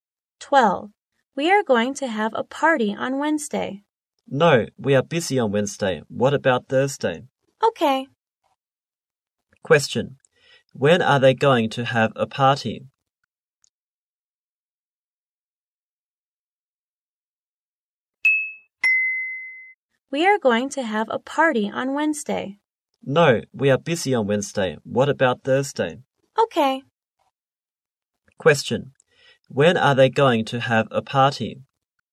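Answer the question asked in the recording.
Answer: On Thursday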